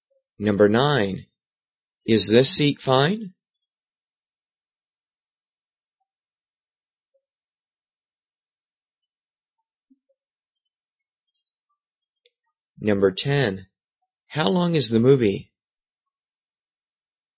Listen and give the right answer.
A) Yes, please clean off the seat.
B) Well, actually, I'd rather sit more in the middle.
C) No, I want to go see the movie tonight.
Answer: B) Well, actually, I'd rather sit more in the middle.

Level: 中级